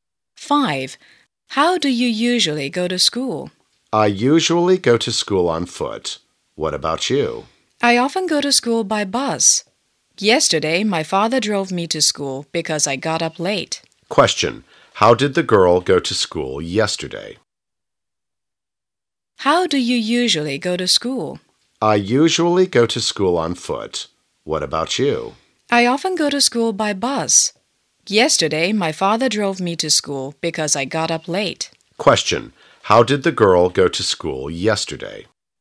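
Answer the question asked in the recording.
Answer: By car (her father drove her).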